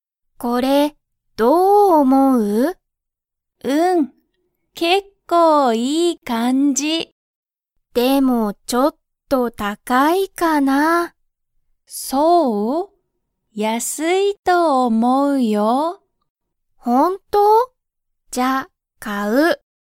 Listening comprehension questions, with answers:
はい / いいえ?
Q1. マキは、それを高(たか)いと思(おも)いますか?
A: いいえ

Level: Level 1